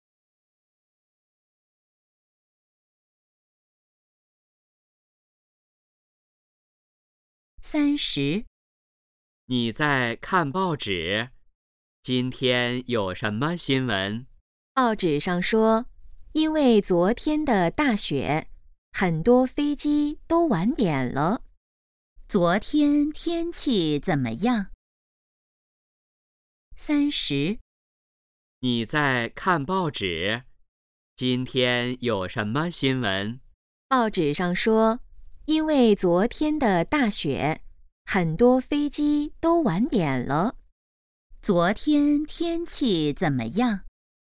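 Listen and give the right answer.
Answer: 下大雪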